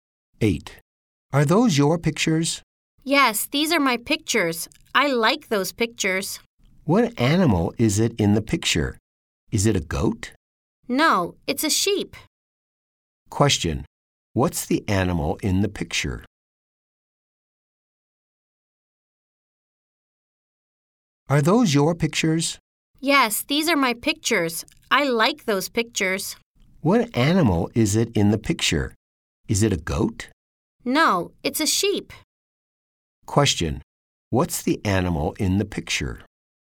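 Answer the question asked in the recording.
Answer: It's a sheep.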